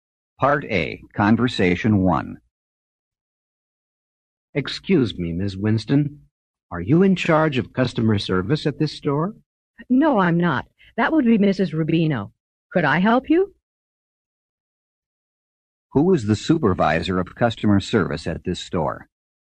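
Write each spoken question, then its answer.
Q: Who is the supervisor of customer service at this store?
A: Mrs. Rubino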